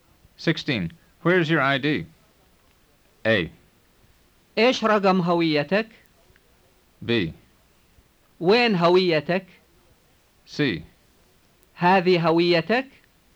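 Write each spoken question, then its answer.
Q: Where is your ID?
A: B: وين هويتك؟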